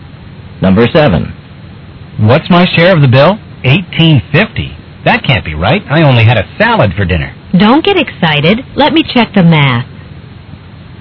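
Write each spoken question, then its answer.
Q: What will the woman probably do next?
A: Recalculate the bill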